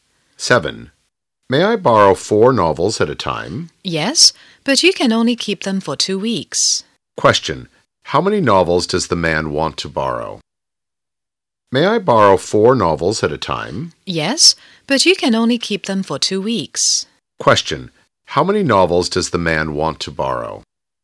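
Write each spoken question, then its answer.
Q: How many novels does the man want to borrow?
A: Four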